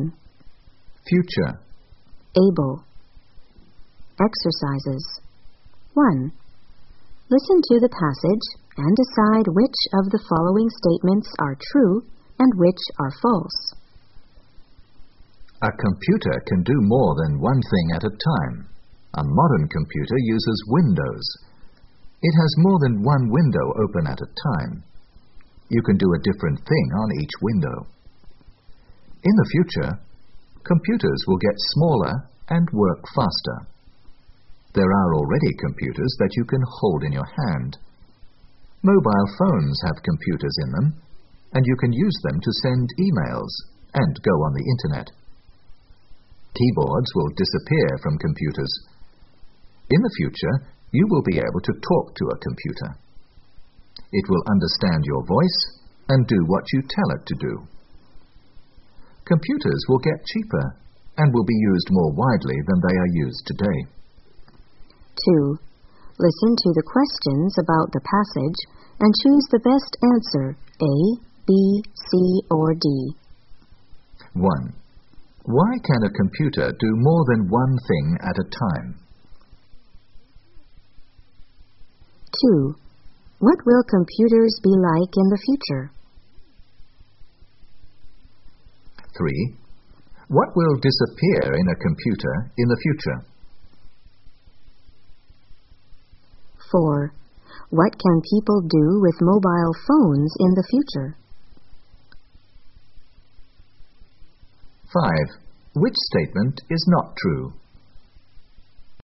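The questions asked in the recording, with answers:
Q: Why can a computer do more than one thing at a time?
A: Because it uses windows, with a different thing on each window

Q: What will computers be like in the future?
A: Smaller, faster and cheaper

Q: What will disappear in a computer in the future?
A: The keyboard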